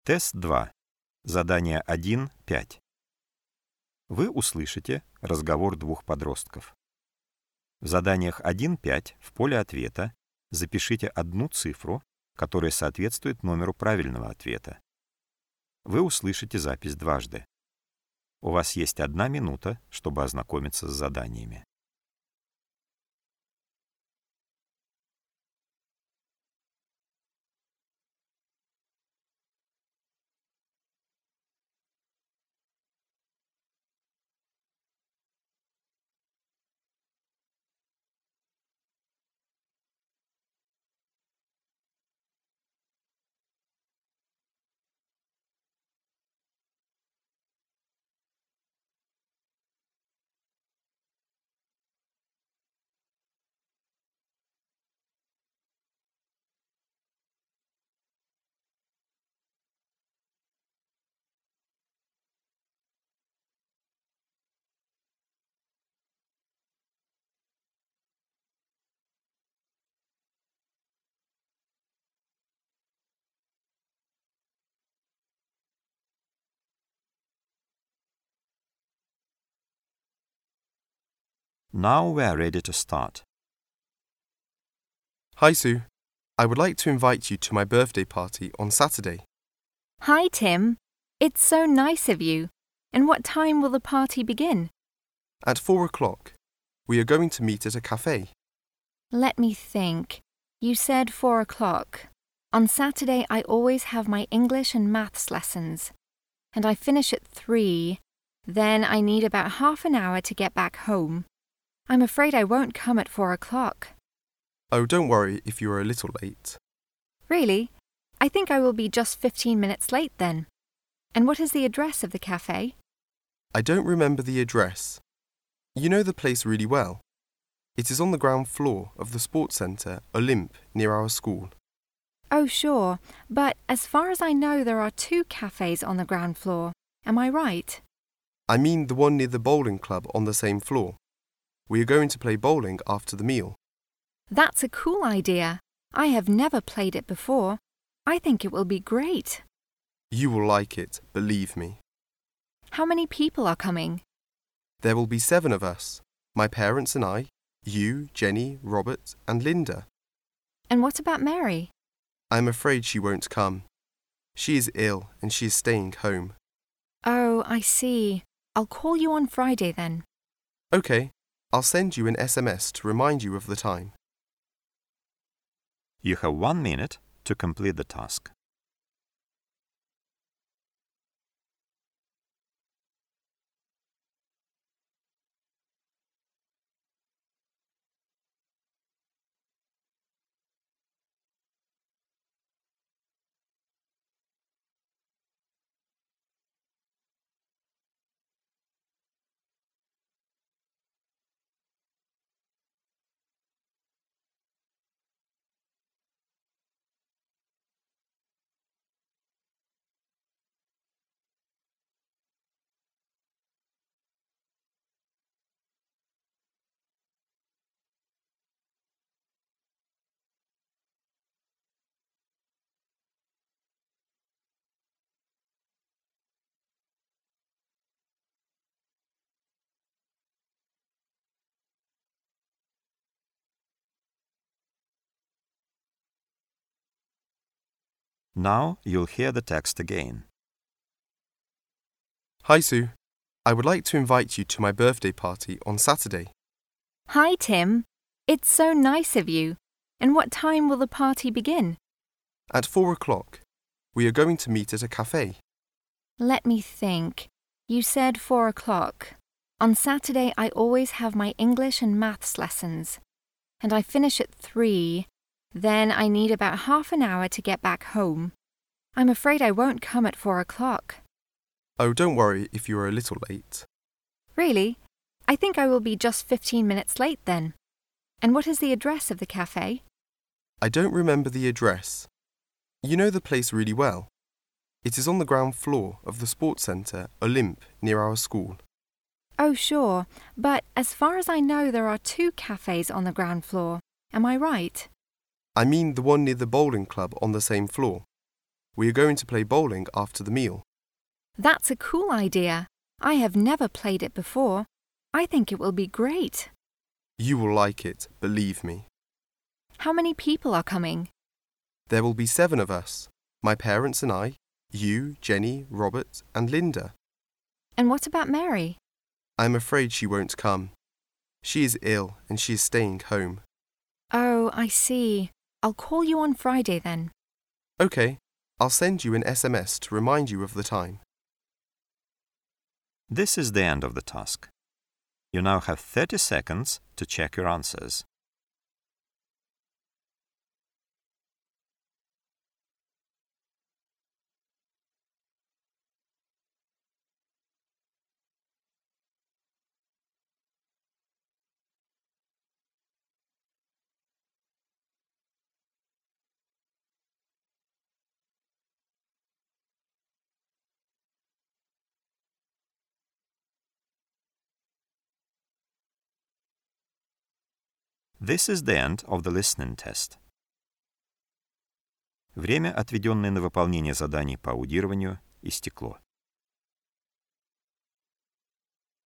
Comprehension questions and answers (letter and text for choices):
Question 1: Tim is going to have is birthday party ....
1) On Tuesday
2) On Friday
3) On Saturday.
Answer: 3) On Saturday.

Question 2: The party will begin...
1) At 4 o'clock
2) At 5 o'clock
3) At 6 o'clock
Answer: 1) At 4 o'clock

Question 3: Susie will not come on time because...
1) She will go to the doctor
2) She has her English and Maths classes on that day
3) She lives far from the café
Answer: 2) She has her English and Maths classes on that day

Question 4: The children are going to ...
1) Play bowling after the meal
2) Have a party at home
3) Play volleyball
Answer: 1) Play bowling after the meal

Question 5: One girl will not come because...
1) She doesn't like parties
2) She is angry with her friend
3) She is ill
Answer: 3) She is ill

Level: Класс: 5